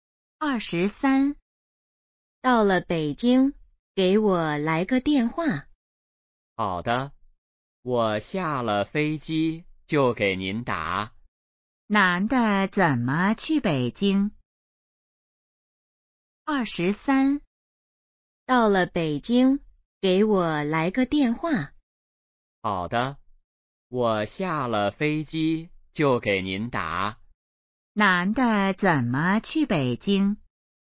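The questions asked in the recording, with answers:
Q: 男的怎么去北京?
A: 坐飞机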